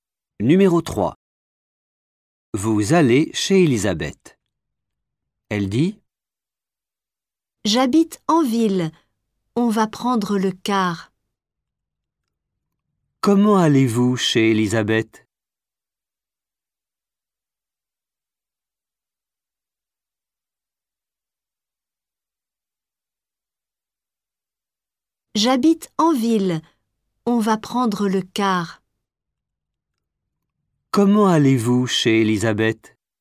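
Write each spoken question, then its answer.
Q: Comment allez-vous chez Elisabeth ?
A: En car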